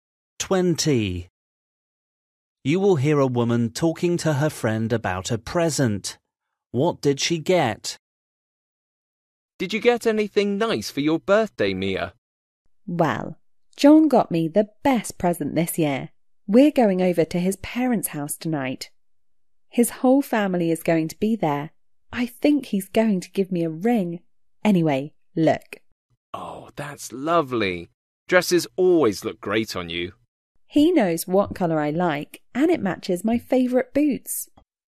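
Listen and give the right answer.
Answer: A dress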